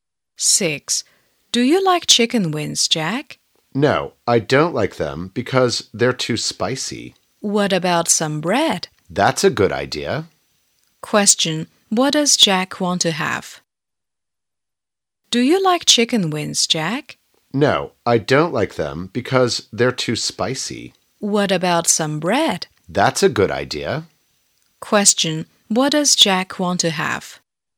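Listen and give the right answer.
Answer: Some bread.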